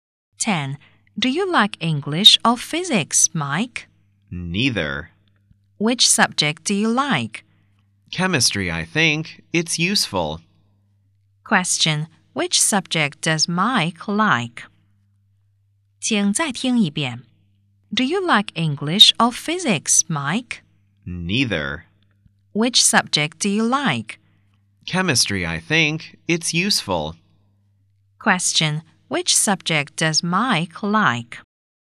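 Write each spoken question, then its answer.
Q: Which subject does Mike like?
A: Chemistry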